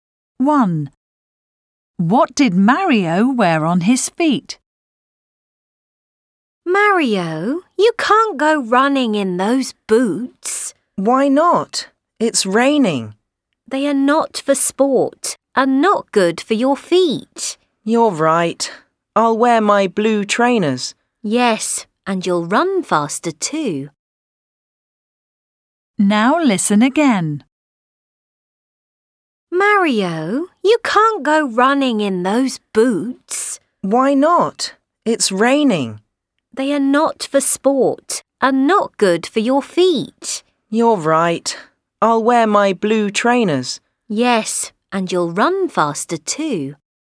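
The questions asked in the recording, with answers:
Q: What did Mario wear on his feet?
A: blue trainers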